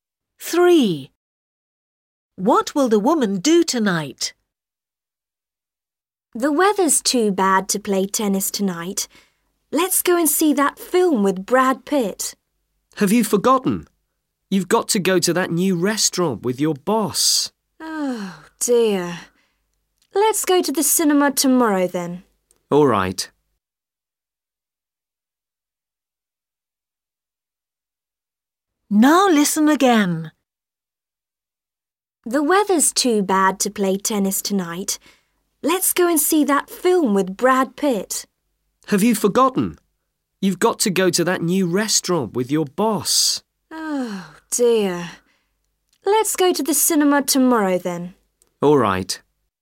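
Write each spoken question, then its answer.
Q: What will the woman do tonight?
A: Go to a new restaurant with her boss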